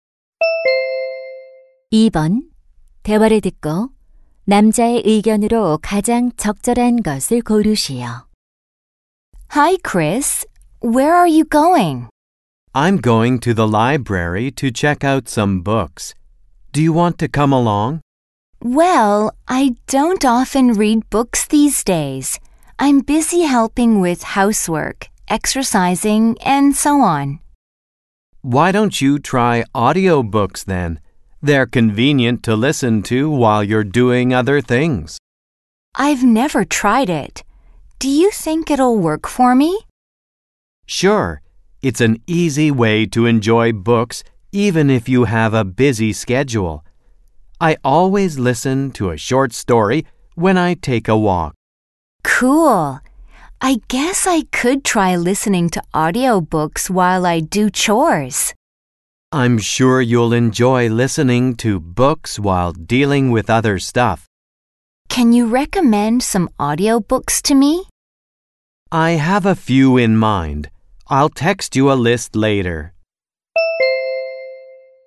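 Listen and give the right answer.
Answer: 오디오북은 다른 일을 하면서 책을 즐기기에 좋다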